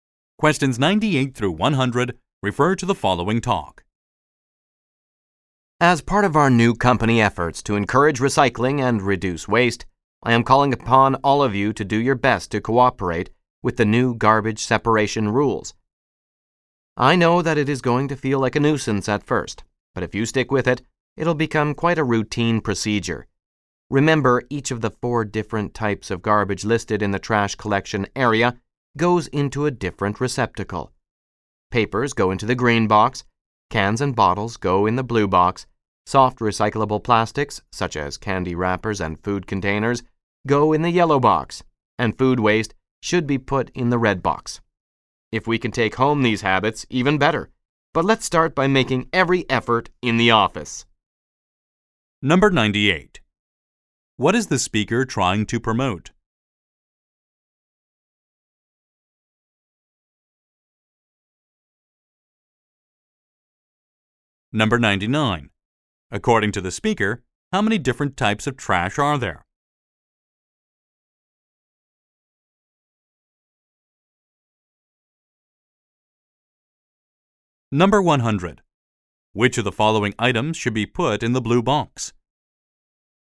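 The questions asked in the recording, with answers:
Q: What is the speaker trying to promote?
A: Recycling and separating garbage

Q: According to the speaker, how many different types of trash are there?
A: Four

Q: Which of the following items should be put in the blue box?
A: Cans and bottles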